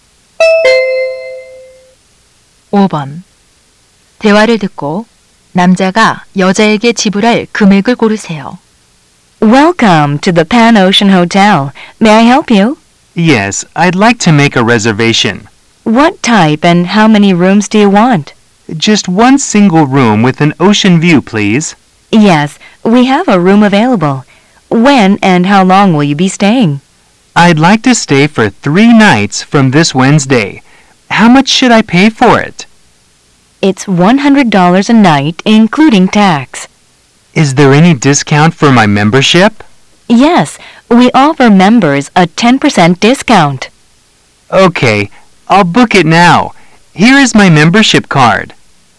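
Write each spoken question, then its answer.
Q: 대화를 듣고 남자가 여자에게 지불할 금액을 고르세요.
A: 270달러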